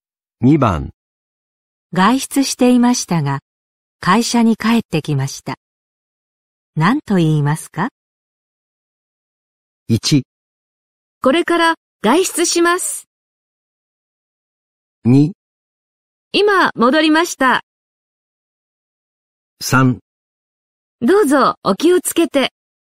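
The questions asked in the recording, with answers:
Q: 外出していましたが、会社に帰ってきました。何と言いますか?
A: 2: 今戻りました。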